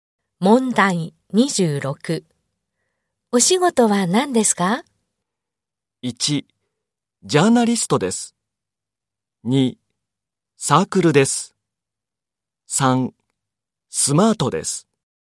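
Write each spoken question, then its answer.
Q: お仕事は何ですか?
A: 1: ジャーナリストです。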